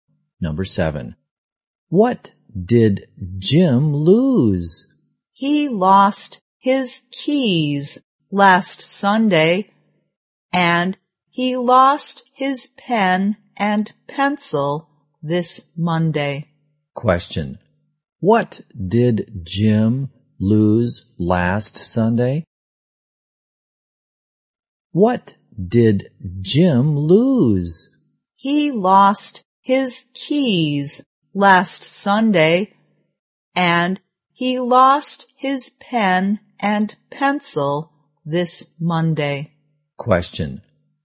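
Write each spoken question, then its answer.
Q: What did Jim lose last Sunday?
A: His keys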